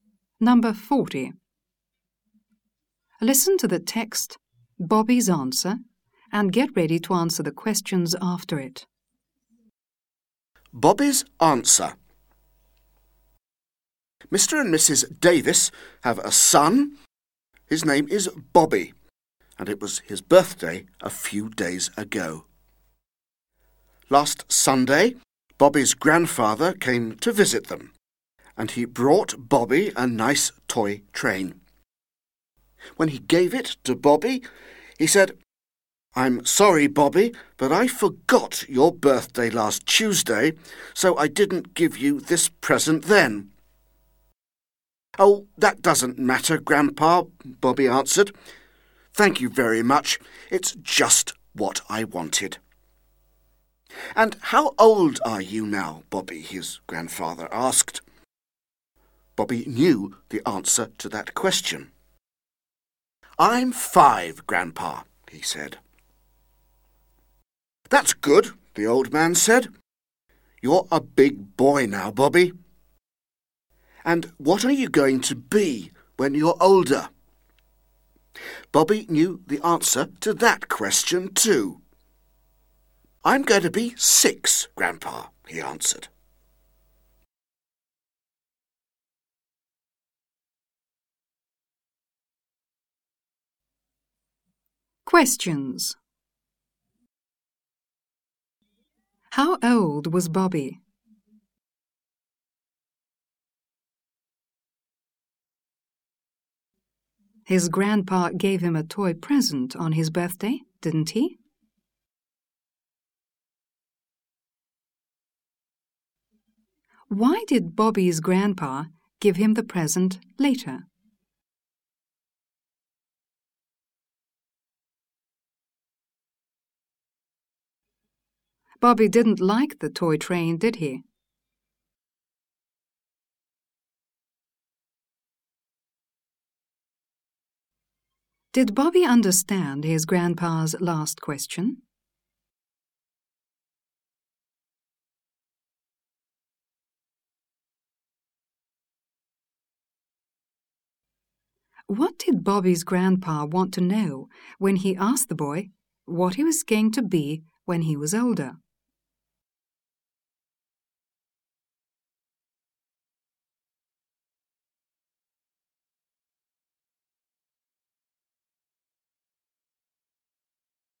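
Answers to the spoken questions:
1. He was 5.
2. No, he gave it to him a few days later, last Sunday.
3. Because he forgot Bobby's birthday.
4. Yes, he did. It was just what he wanted.
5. No, he didn't.
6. What job Bobby wanted to do when he grew up.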